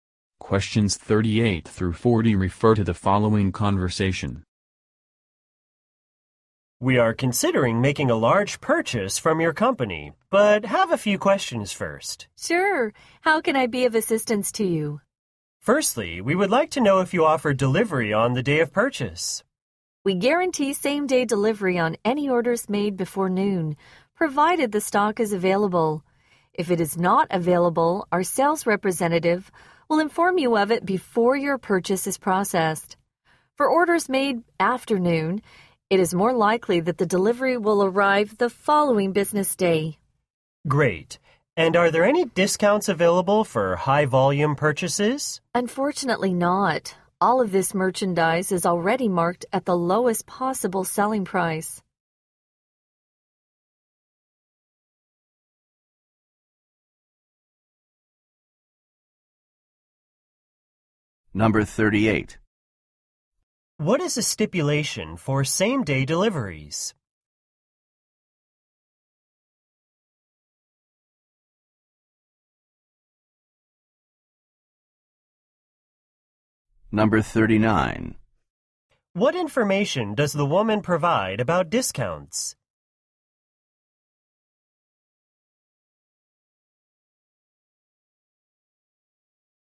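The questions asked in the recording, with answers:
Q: What is the stipulation for same-day deliveries?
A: Order before noon and stock must be available

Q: What information does the woman provide about discounts?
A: None are available; prices are already lowest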